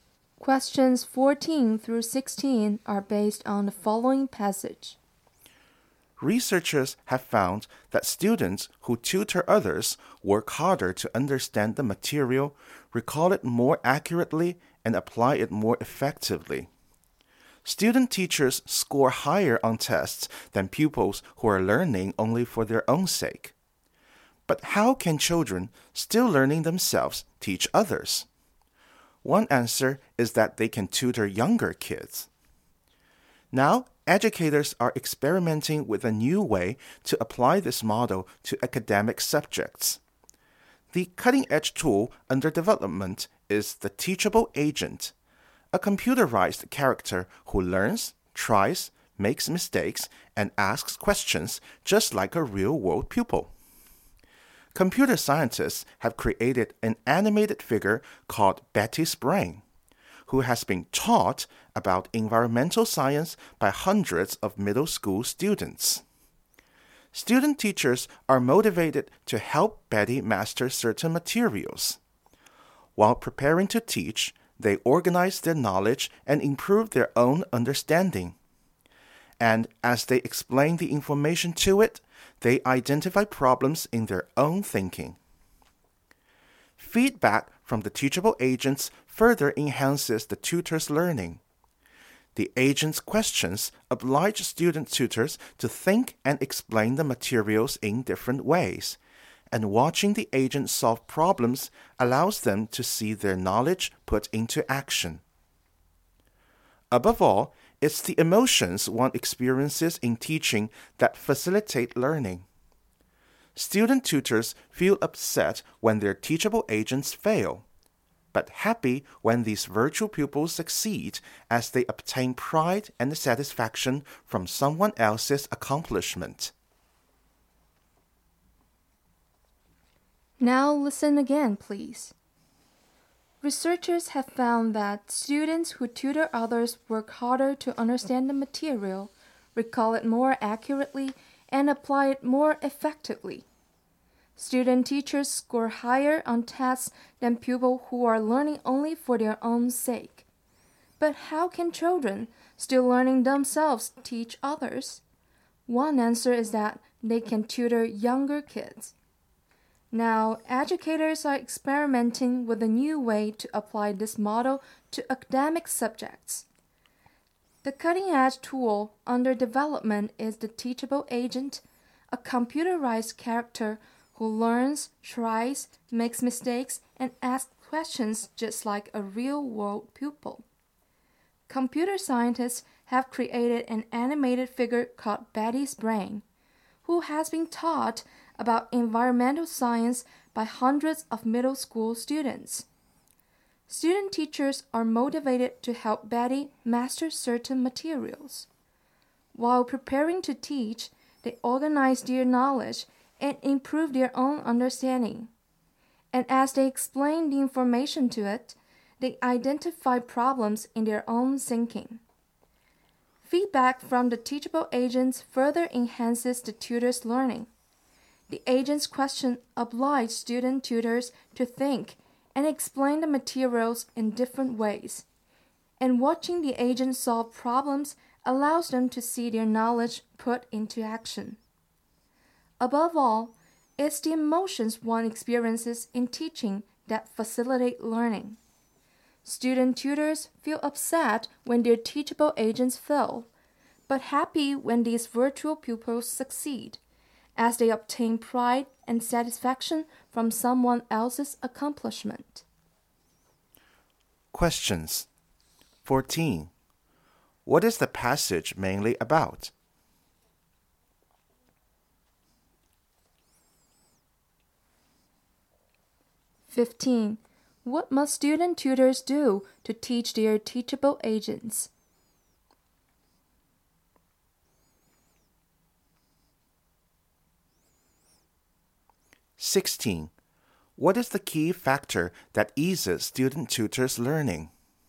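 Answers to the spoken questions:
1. Teachable agents that help students learn by tutoring
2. Organize their knowledge and improve their own understanding.
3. The emotions they experience in teaching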